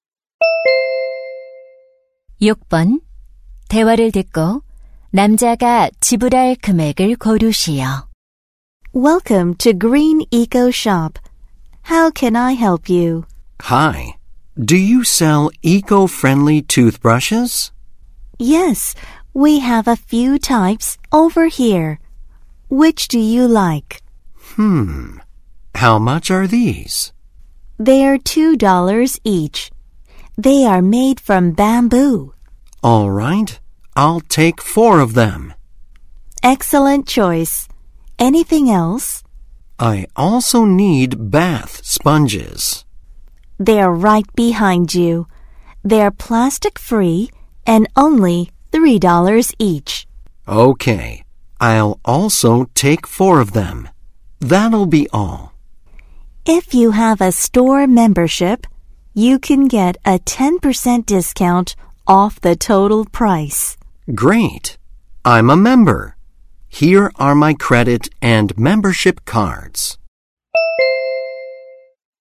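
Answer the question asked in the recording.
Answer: $18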